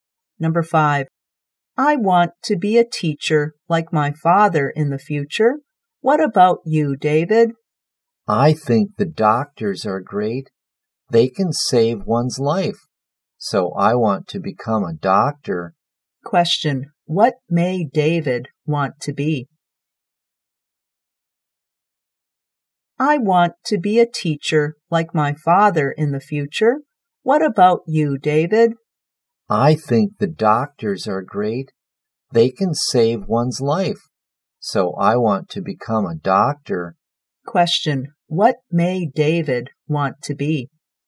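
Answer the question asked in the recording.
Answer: A doctor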